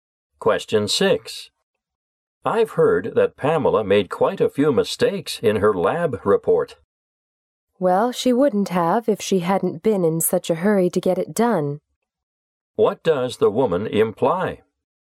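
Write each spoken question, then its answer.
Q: What does the woman imply?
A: Pamela made mistakes because she rushed the report.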